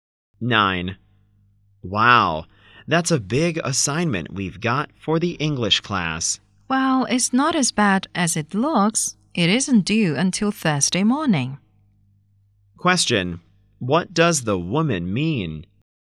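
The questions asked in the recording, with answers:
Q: What does the woman mean?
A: They have enough time to finish the assignment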